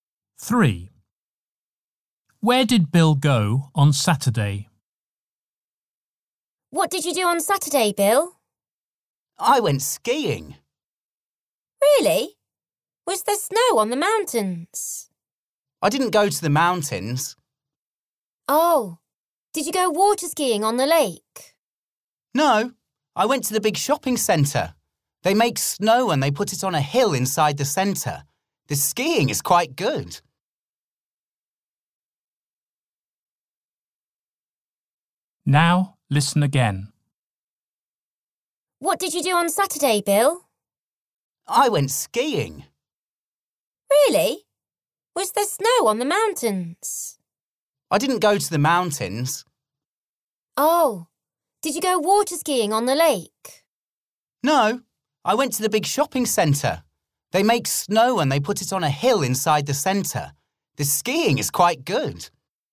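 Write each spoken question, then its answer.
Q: Where did Bill go on Saturday?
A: To the big shopping centre (indoor skiing)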